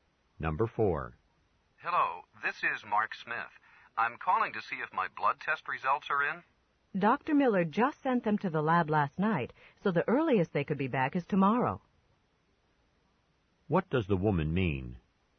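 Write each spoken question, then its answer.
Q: What does the woman mean?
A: The results won't be ready until tomorrow at the earliest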